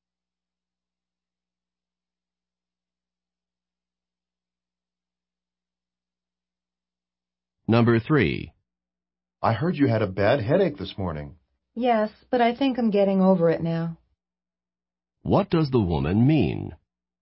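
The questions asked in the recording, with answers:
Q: What does the woman mean?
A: She is recovering from her headache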